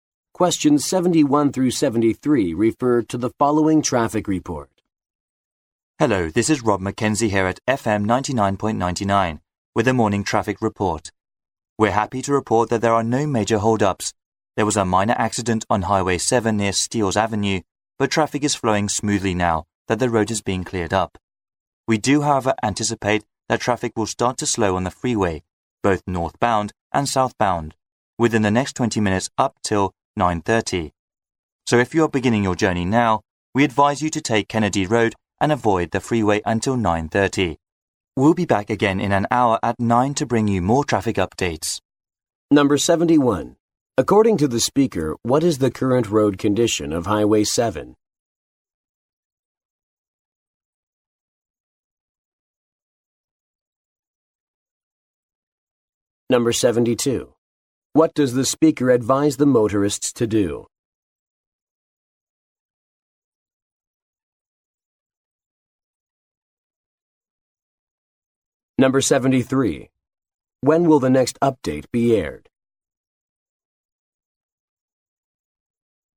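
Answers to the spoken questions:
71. Traffic is flowing smoothly
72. Take Kennedy Road and avoid the freeway
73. At 9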